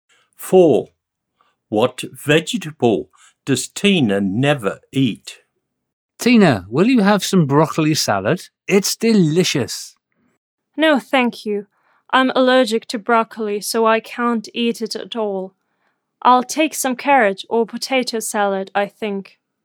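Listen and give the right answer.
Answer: broccoli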